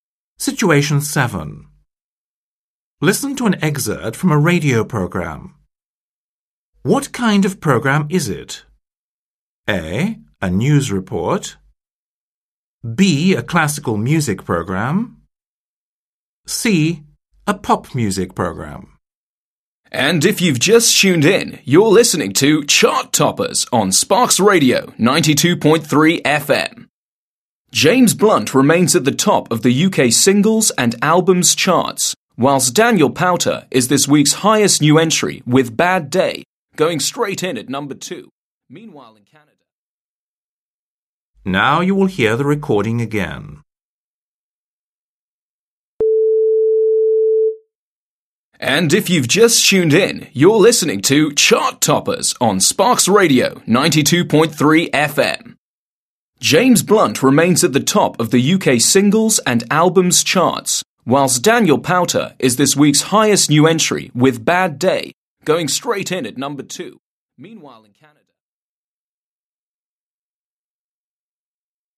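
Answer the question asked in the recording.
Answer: C: A pop music program.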